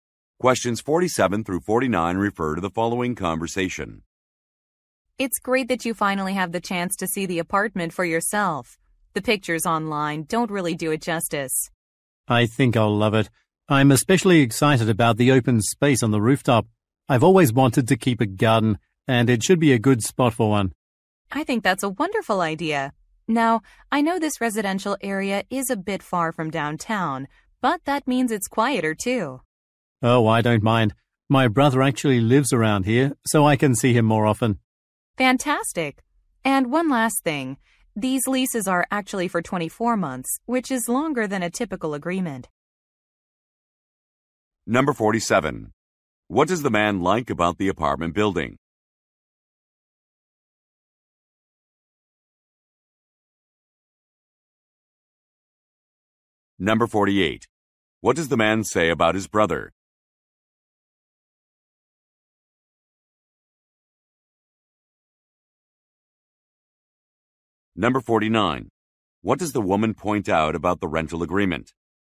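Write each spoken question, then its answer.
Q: What does the man like about the apartment building?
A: The open space on the rooftop

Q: What does the man say about his brother?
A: He lives in the area

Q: What does the woman point out about the rental agreement?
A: It is for 24 months, longer than usual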